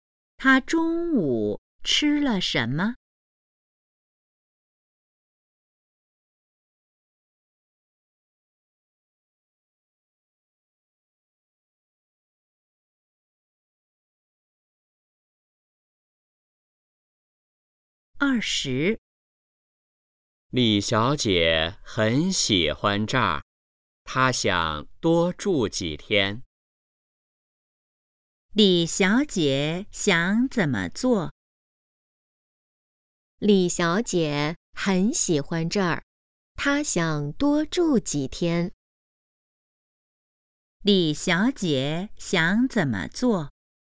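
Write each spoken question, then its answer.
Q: 李小姐想怎么做?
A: 多住几天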